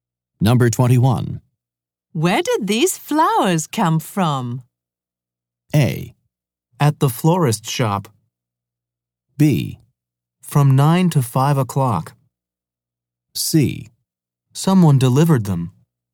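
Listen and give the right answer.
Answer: C: Someone delivered them.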